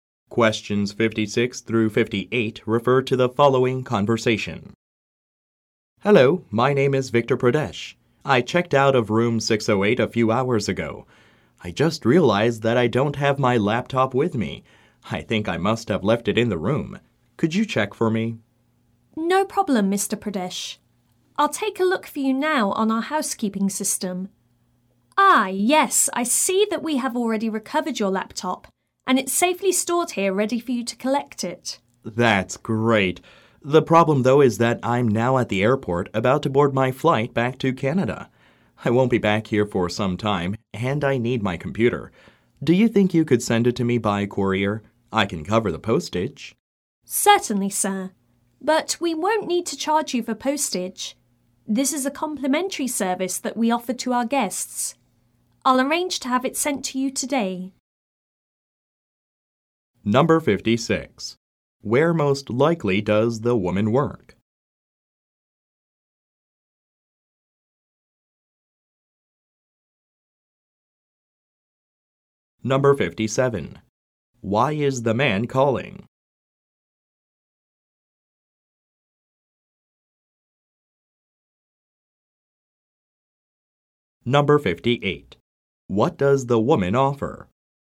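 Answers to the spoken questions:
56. At a hotel
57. He left his laptop in his hotel room
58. To send the laptop by courier free of charge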